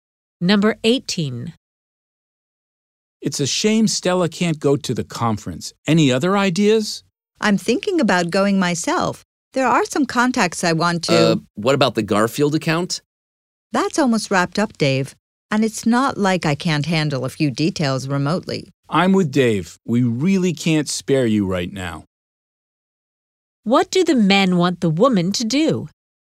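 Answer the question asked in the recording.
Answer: Stay and not go to the conference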